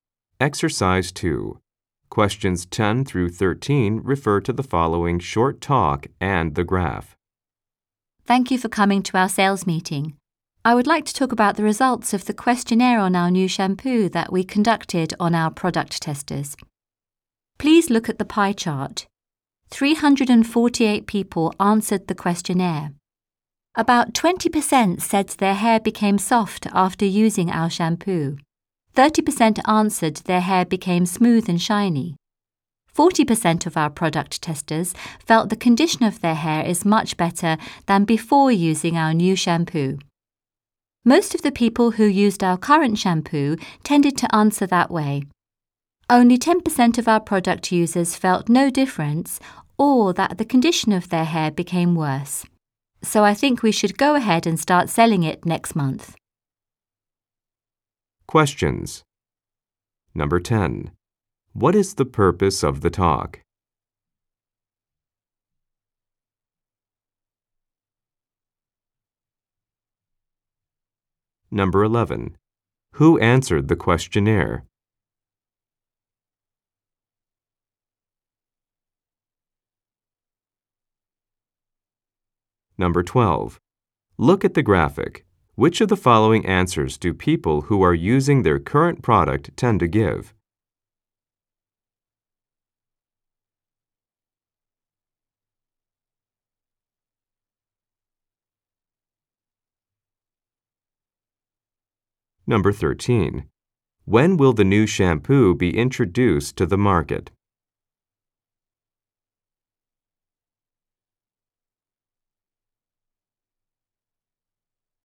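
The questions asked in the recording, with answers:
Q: What is the purpose of the talk?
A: To report the questionnaire results on the new shampoo

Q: Who answered the questionnaire?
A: Product testers (348 people)

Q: Which of the following answers do people who are using their current product tend to give?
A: Their hair condition is much better than before

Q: When will the new shampoo be introduced to the market?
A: Next month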